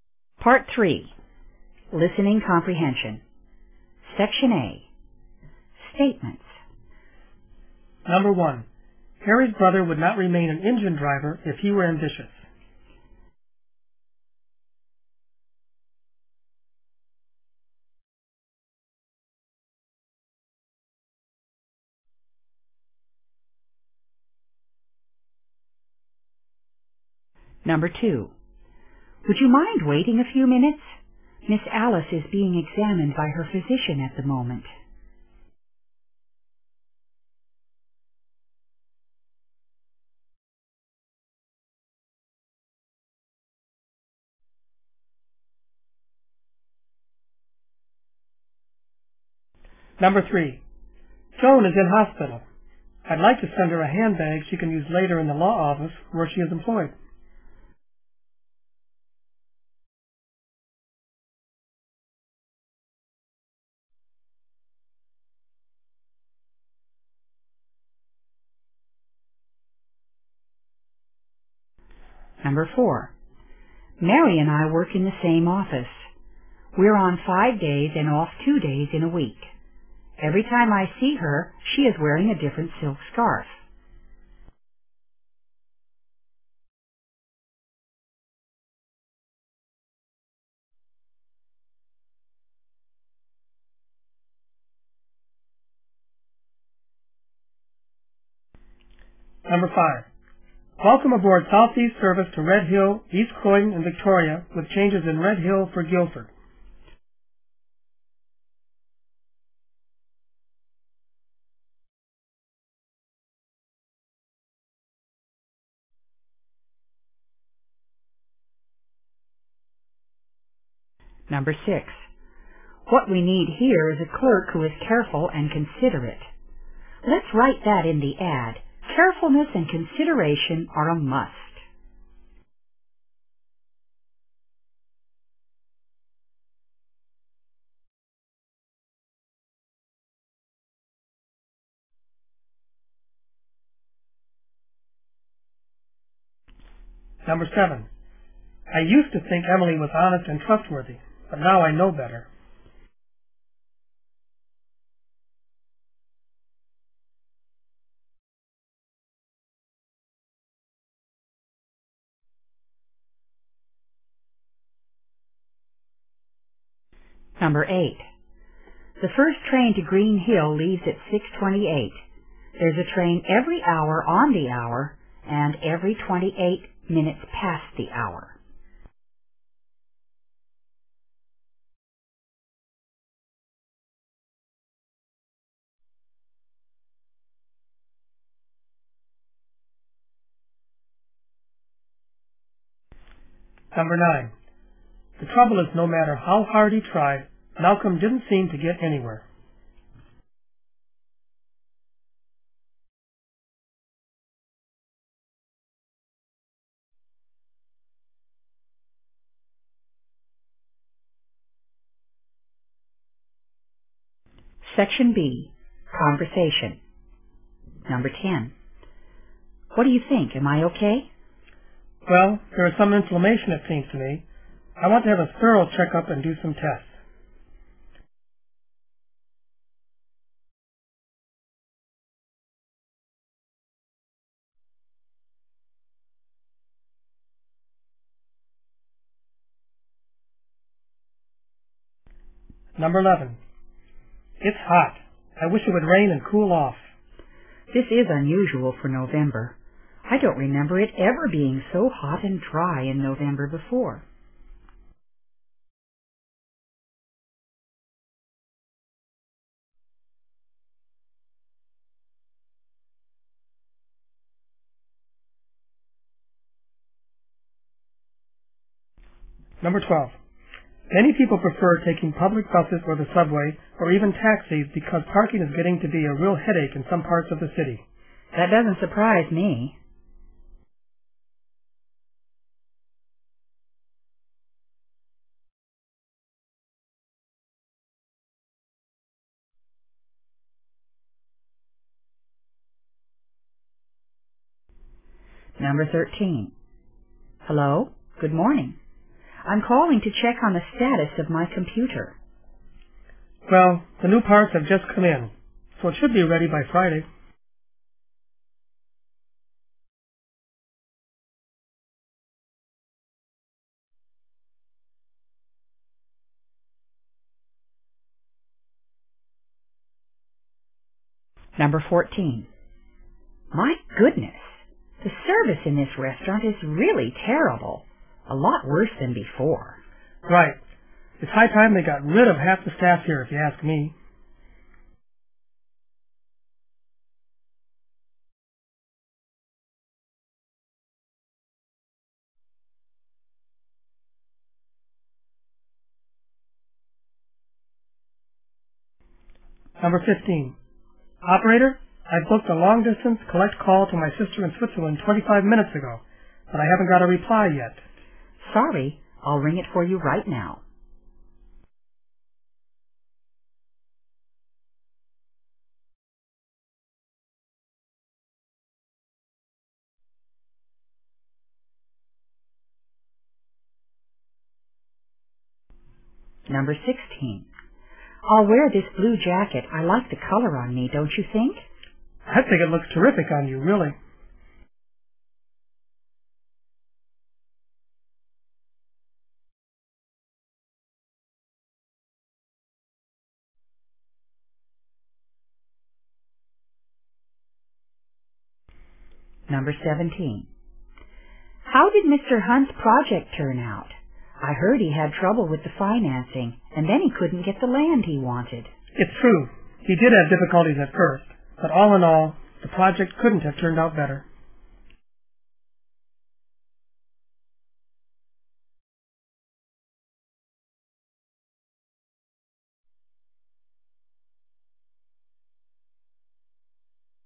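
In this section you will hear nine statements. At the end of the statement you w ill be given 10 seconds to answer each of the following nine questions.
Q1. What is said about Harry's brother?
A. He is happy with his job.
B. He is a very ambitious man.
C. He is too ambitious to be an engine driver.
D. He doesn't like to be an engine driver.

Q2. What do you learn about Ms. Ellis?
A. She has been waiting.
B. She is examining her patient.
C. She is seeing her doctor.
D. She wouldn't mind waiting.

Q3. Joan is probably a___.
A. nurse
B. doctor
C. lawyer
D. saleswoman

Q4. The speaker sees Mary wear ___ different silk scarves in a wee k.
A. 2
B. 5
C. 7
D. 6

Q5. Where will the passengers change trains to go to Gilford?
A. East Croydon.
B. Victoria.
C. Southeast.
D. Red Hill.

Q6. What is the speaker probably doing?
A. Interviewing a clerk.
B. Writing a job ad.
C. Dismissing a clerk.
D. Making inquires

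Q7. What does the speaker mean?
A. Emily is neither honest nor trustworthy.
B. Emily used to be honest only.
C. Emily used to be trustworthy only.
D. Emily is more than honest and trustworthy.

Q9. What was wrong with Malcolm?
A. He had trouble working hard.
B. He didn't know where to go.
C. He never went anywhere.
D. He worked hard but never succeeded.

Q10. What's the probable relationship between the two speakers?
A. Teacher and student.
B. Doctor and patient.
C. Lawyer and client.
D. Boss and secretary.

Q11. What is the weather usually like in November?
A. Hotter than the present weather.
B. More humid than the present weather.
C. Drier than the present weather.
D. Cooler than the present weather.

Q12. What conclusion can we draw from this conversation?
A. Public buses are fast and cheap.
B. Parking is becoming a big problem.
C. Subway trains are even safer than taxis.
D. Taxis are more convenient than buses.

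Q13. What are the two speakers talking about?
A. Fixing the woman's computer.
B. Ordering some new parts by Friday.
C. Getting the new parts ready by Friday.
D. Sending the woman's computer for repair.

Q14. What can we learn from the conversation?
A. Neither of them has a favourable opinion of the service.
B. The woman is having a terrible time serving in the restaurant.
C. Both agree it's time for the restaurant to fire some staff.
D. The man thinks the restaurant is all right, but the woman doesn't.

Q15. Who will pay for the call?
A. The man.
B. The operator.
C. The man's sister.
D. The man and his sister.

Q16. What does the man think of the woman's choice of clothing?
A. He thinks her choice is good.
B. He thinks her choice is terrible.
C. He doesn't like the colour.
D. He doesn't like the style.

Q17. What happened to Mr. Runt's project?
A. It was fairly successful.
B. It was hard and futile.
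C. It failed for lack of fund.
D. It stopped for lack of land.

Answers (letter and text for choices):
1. A. He is happy with his job.
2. C. She is seeing her doctor.
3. C. lawyer
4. B. 5
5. D. Red Hill.
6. B. Writing a job ad.
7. A. Emily is neither honest nor trustworthy.
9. D. He worked hard but never succeeded.
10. B. Doctor and patient.
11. D. Cooler than the present weather.
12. B. Parking is becoming a big problem.
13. A. Fixing the woman's computer.
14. A. Neither of them has a favourable opinion of the service.
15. C. The man's sister.
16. A. He thinks her choice is good.
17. A. It was fairly successful.

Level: 英语专业四级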